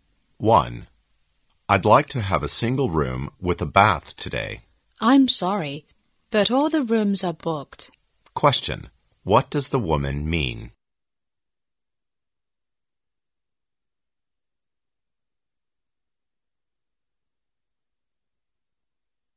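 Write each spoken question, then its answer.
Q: Question, what does the woman mean?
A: No rooms are available; all the rooms are booked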